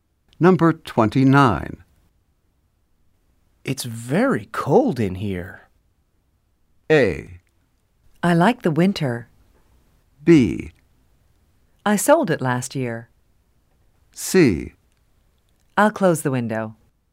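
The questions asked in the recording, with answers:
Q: It's very cold in here.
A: C: I'll close the window.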